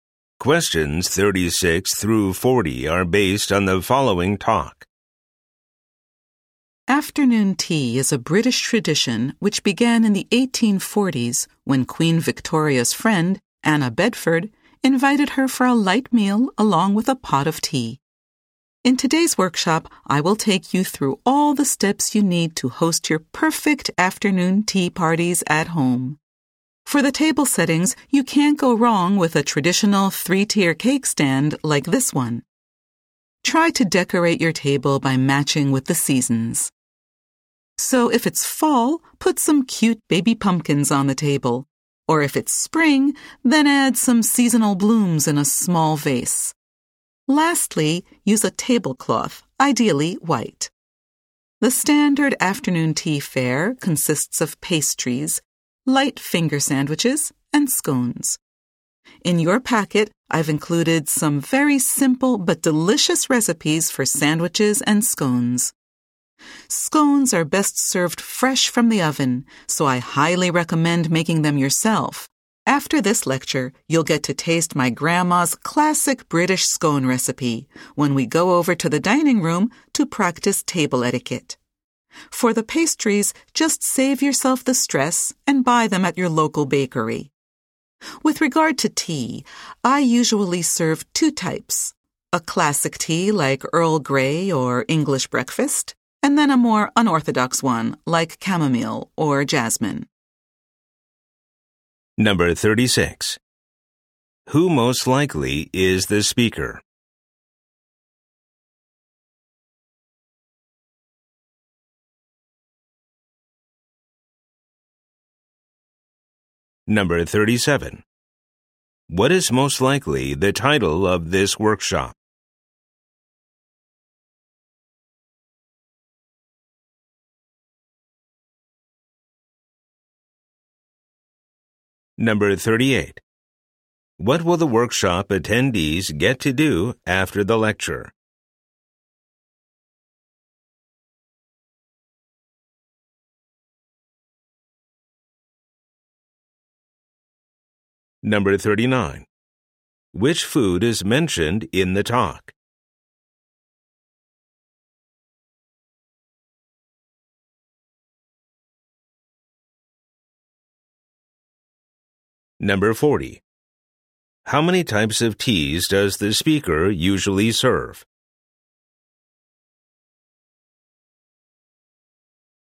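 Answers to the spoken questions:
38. Taste scones and practice table etiquette
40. Two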